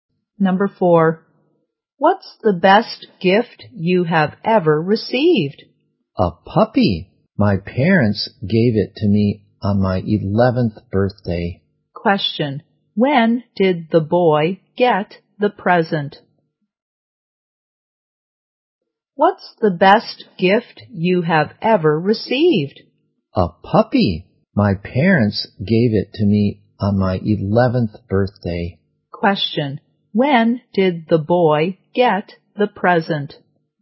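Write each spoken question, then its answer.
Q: when did the boy get the present?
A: On his 11th birthday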